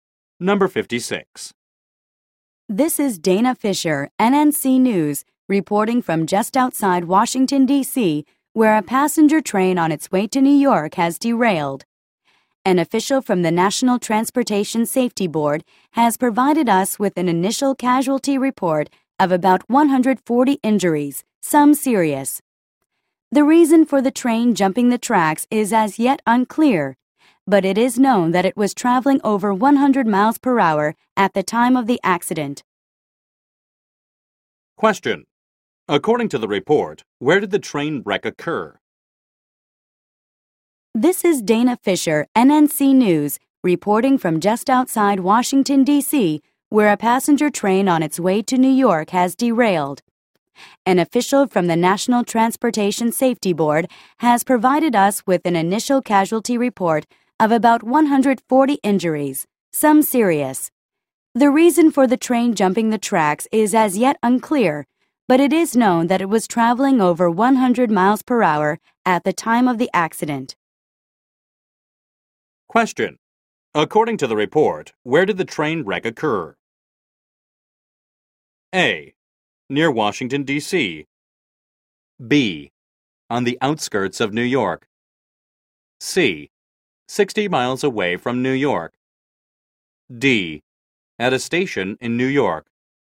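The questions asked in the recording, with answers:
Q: According to the report, where did the train wreck occur?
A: A: Near Washington, D.C.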